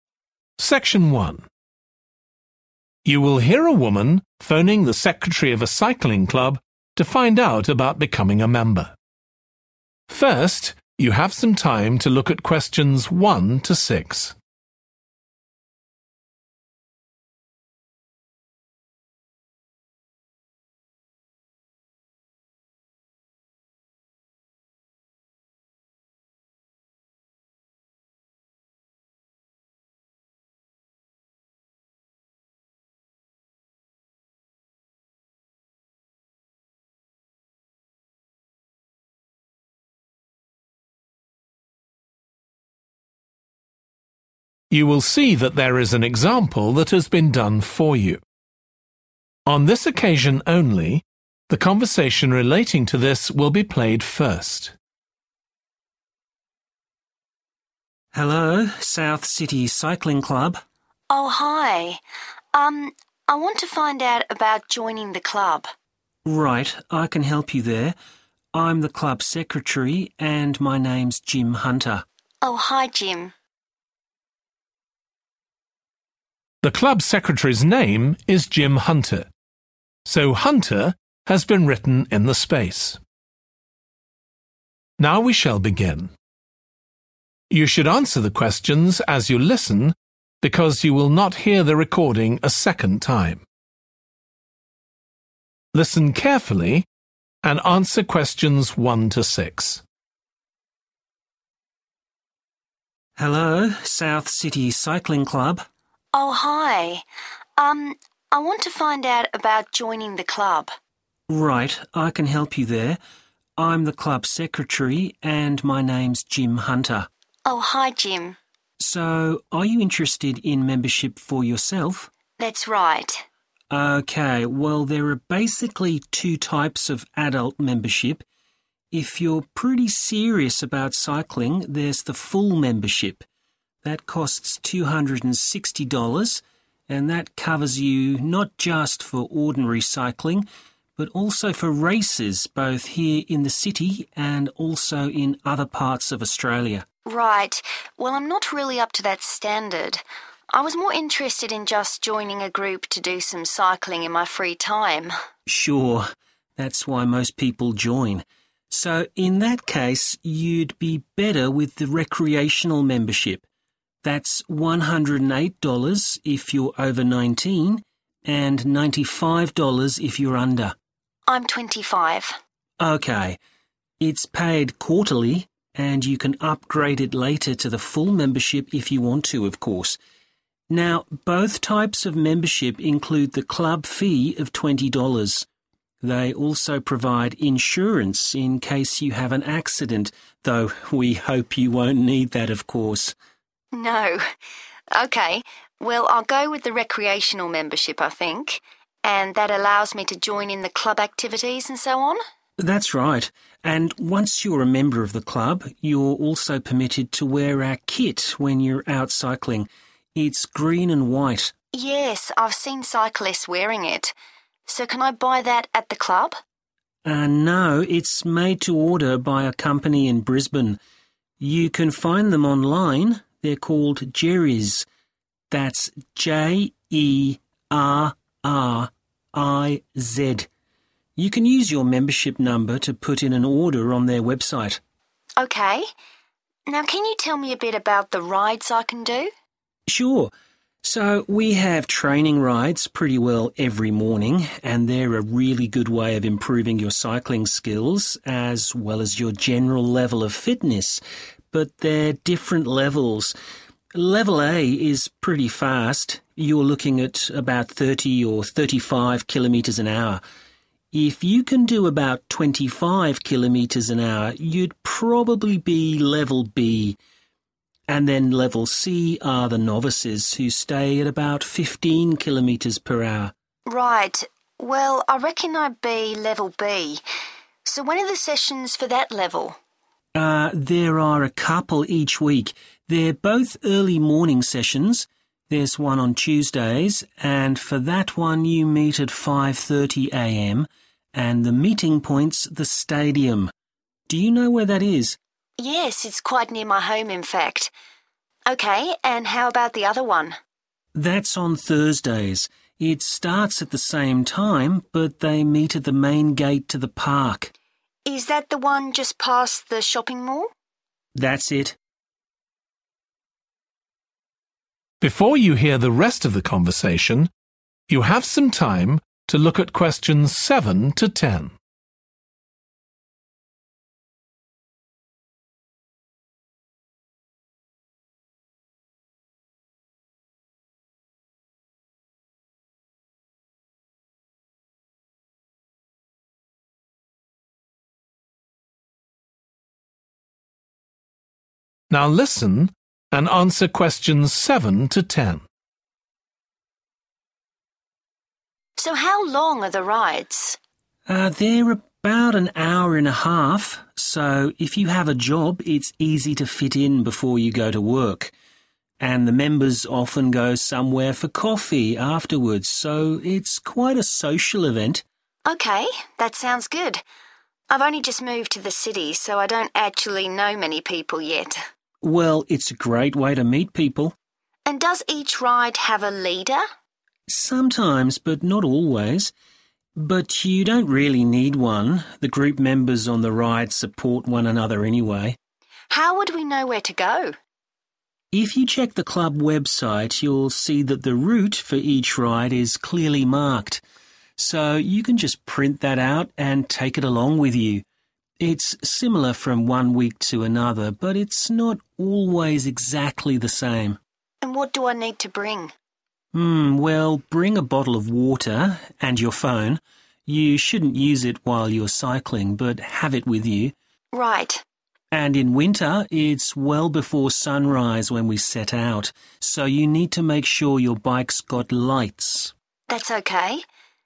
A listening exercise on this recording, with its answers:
Complete the notes below. Write ONE WORD AND/OR A NUMBER for each answer.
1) Full membership costs $260; this covers cycling and 1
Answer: races

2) Cost of membership includes the club fee and 2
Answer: insurance

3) The club kit is made by a company called 3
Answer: Jerriz

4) Level B: speed about 4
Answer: 25

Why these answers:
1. that covers you not just for ordinary cycling but also for races both here in the city and also in other parts of Australia [bao gồm không chỉ đạp xe thông thường mà còn cho cả các cuộc đua trong thành phố và cả ở các vùng khác của Úc]
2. both types of membership include the club fee of 20 dollars. They also provide insurance in case you have an accident [cả hai cấp hội viên đều bao gồm phí câu lạc bộ là 20 đô la. Chúng cũng cung cấp bảo hiểm trong trường hợp bạn gặp tai nạn]
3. You can find them online: they're called Jerriz [Bạn có thể tìm thấy họ trực tuyến đấy: tên họ là Jerriz]